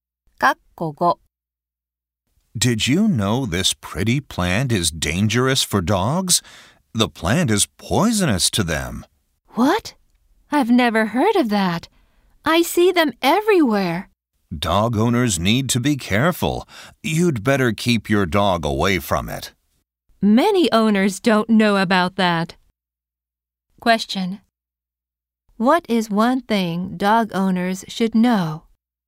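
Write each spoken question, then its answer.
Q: What is one thing dog owners should know?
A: The plant is poisonous to dogs.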